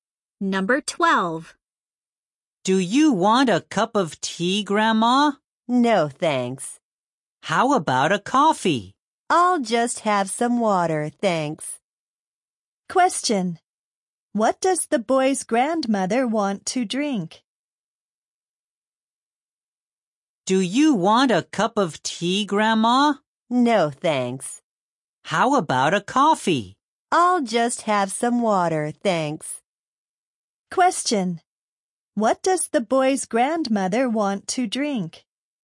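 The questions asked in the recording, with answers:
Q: What does the boy's grandmother want to drink?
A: Water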